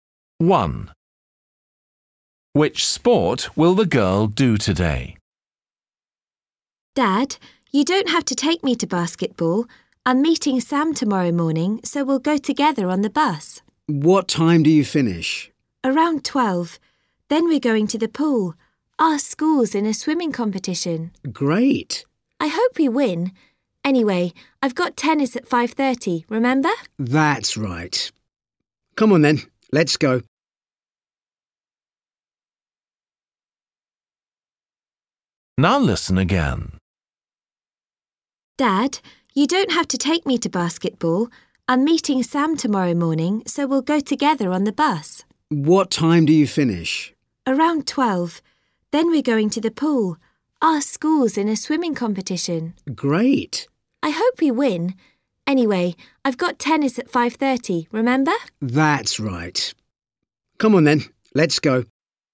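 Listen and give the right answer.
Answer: tennis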